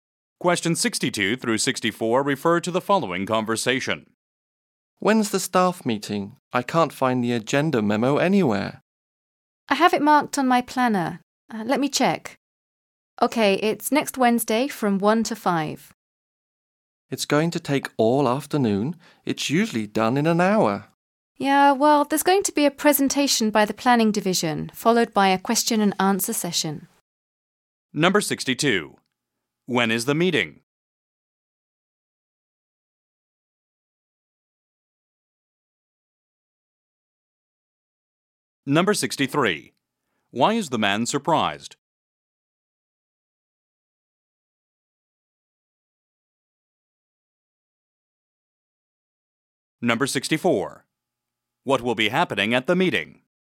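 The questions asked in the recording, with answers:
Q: When is the meeting?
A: Next Wednesday from 1 to 5

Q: Why is the man surprised?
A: It will take all afternoon instead of the usual hour

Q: What will be happening at the meeting?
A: A presentation by the planning division and a Q&A session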